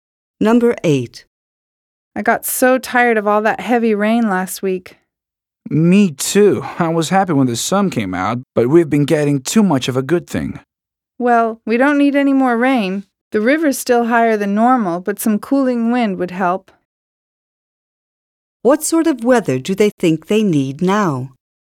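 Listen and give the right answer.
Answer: Cooling wind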